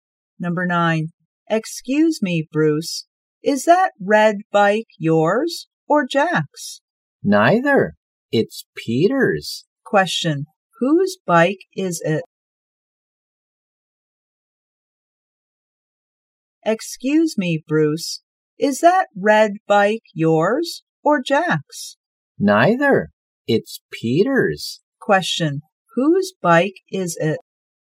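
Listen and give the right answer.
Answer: Peter's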